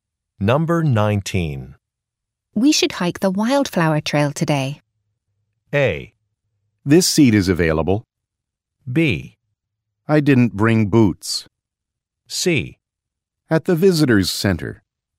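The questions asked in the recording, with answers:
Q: We should hike the wildflower trail today.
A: B: I didn't bring boots.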